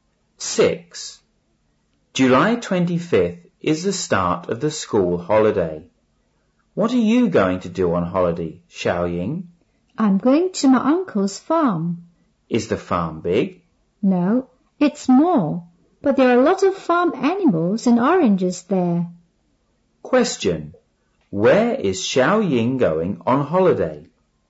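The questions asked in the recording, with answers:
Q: Where is Xiaoying going on holiday?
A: To her uncle's farm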